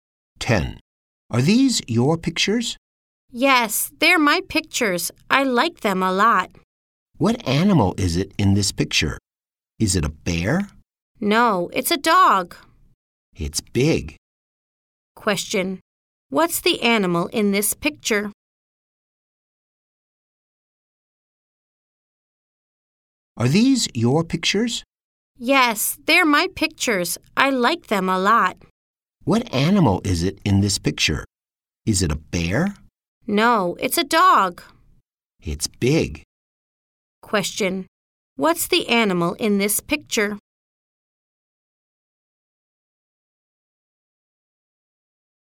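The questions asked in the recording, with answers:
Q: What's the animal in this picture?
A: A dog.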